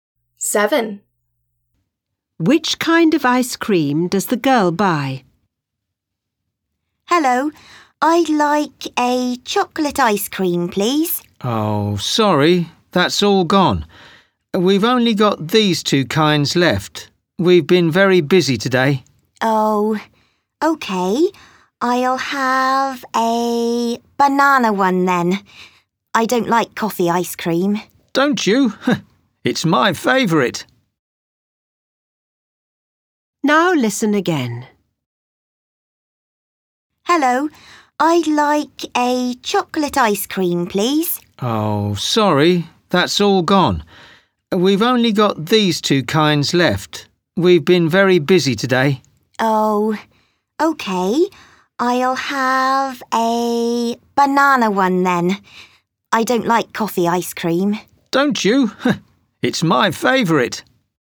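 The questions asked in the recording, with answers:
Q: Which kind of ice cream does the girl buy?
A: Banana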